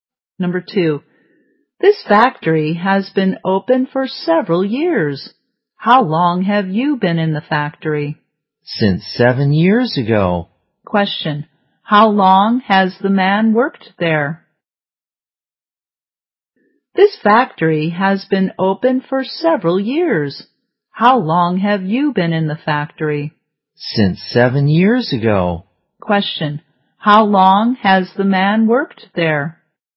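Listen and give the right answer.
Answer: For 7 years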